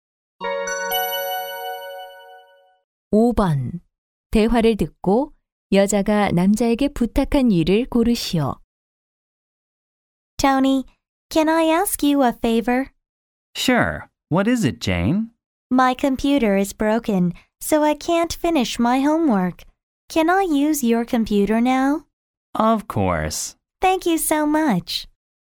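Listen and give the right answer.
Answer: 컴퓨터 빌려주기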